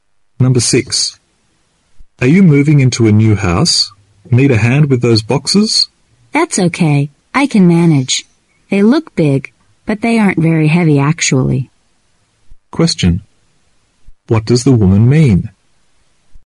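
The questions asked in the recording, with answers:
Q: What does the woman mean?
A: She doesn't need help; the boxes aren't very heavy.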